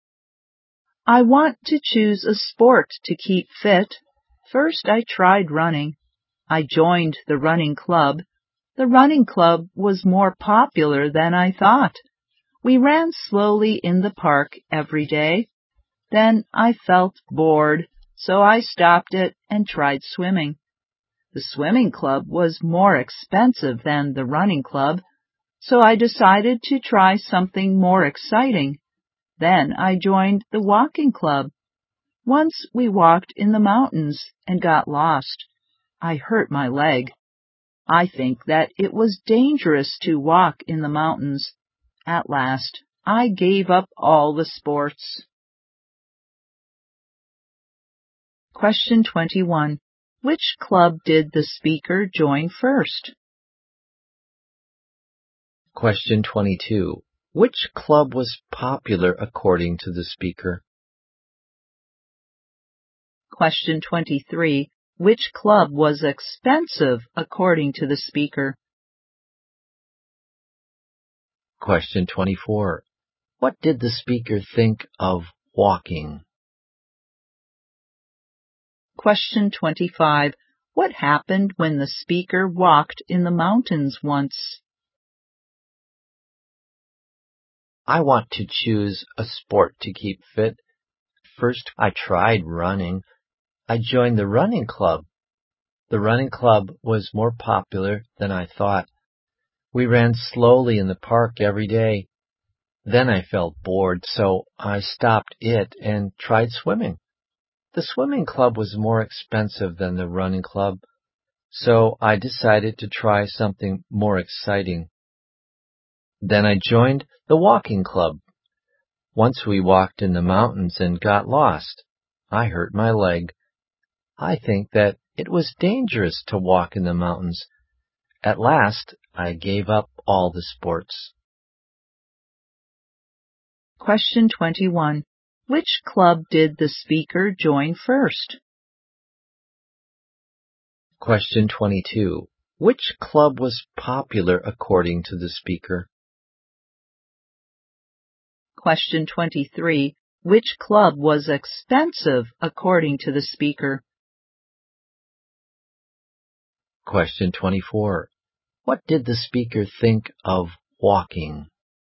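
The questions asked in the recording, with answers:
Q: Which club did the speaker join first?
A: The running club

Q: Which club was popular according to the speaker?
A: The running club

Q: Which club was expensive according to the speaker?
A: The swimming club

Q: What did the speaker think of walking?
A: It was dangerous to walk in the mountains

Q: What happened when the speaker walked in the mountains once?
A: They got lost and the speaker hurt a leg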